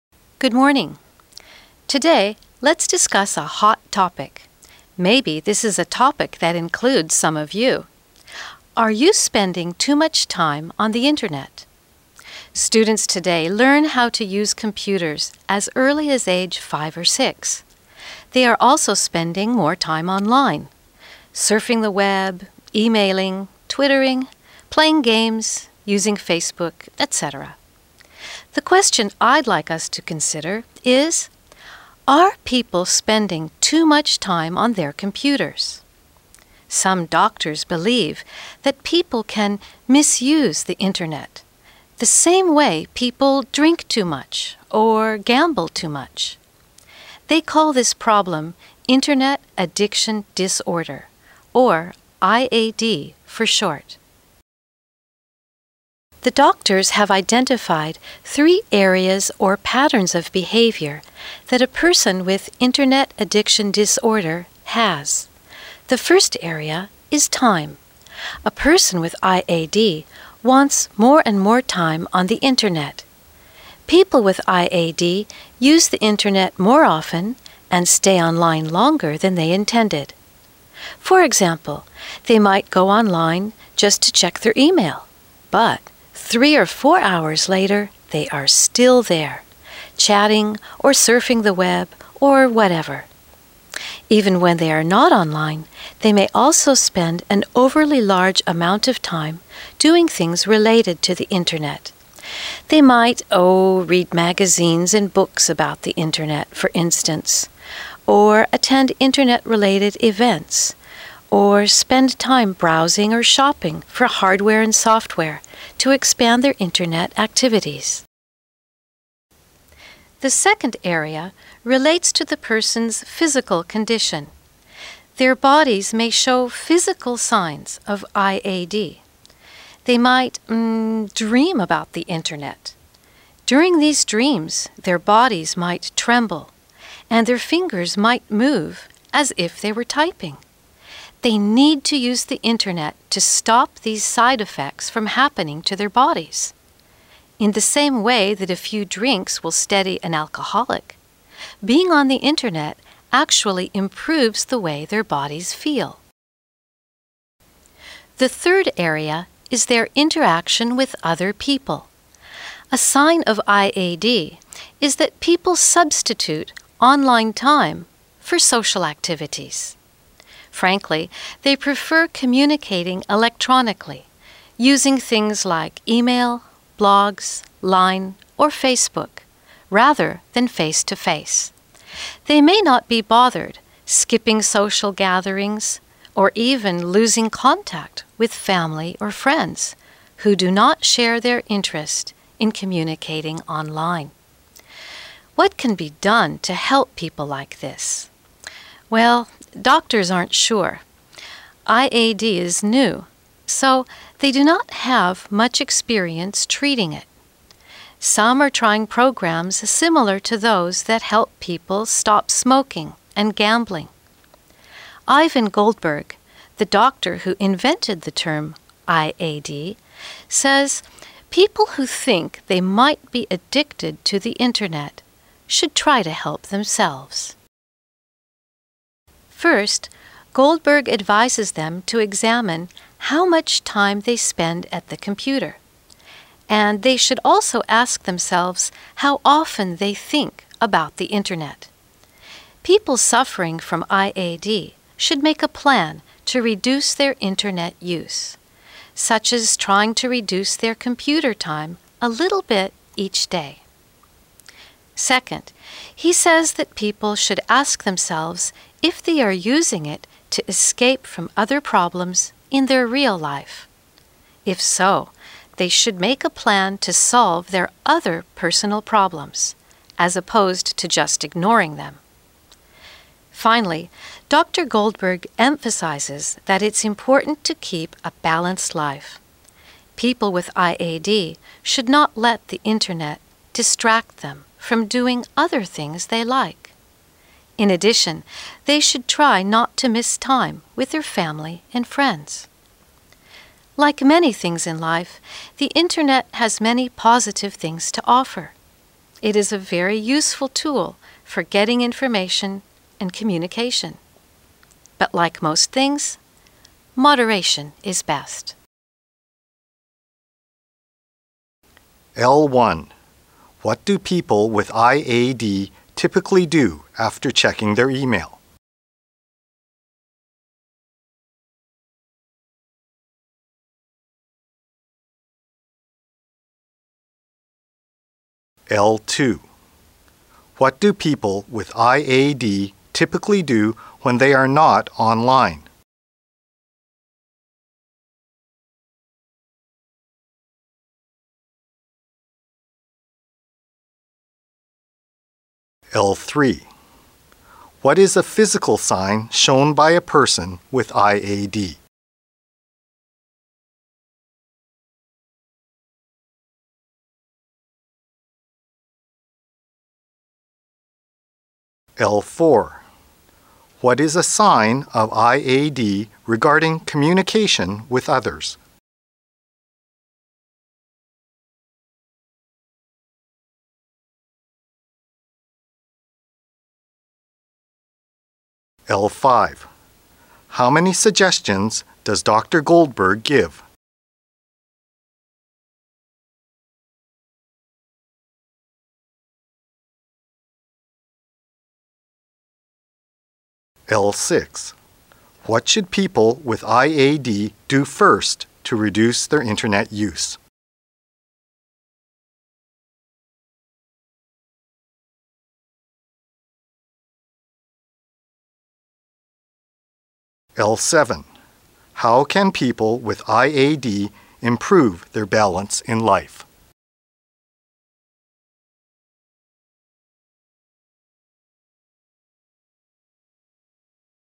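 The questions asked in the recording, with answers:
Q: What do people with IAD typically do after checking their email?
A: They stay online for 3 or 4 more hours, chatting or surfing the web

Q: What do people with IAD typically do when they are not online?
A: Things related to the internet, like reading internet magazines or shopping for hardware and software

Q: What is a physical sign shown by a person with IAD?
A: Dreaming about the internet, with trembling bodies and fingers moving as if typing

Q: What is a sign of IAD regarding communication with others?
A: They replace social activities with online time and prefer electronic communication to face-to-face

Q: How many suggestions does Dr. Goldberg give?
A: Three

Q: How can people with IAD improve their balance in life?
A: By still doing other things they like and not missing time with family and friends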